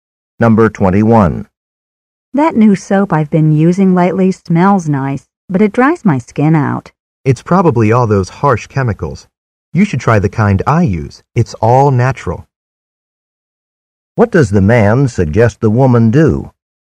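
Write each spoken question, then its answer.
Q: What does the man suggest the woman do?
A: Use the natural soap he uses.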